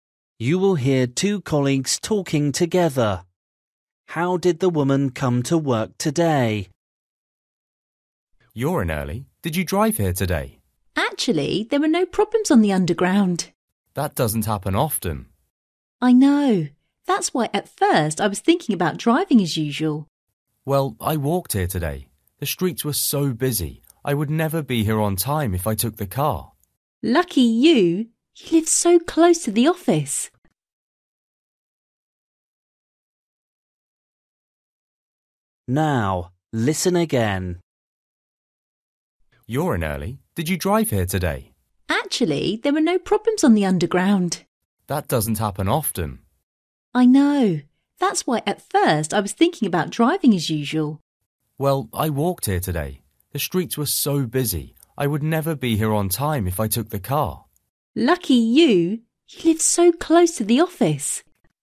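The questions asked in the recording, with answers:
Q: How did the woman come to work today?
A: She walked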